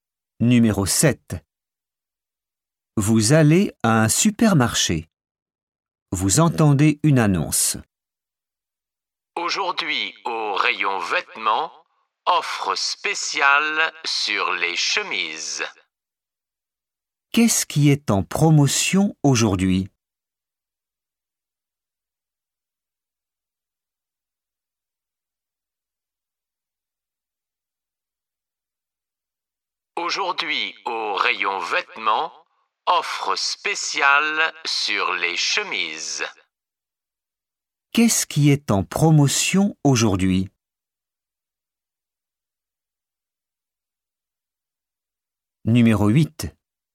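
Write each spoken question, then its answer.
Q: Qu'est-ce qui est en promotion aujourd'hui ?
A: Les chemises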